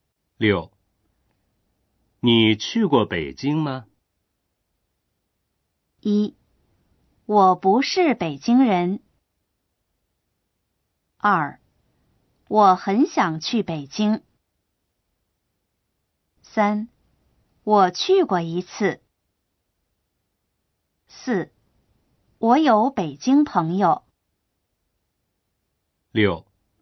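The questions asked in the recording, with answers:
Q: 你去过北京吗?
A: 3: 我去过一次。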